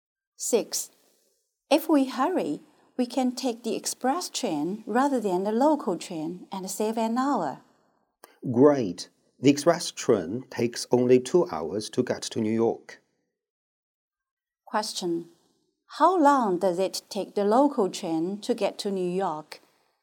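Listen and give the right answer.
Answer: 3 hours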